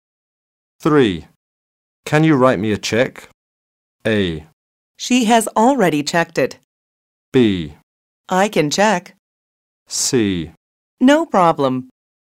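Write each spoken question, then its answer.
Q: Can you write me a check?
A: C: No problem.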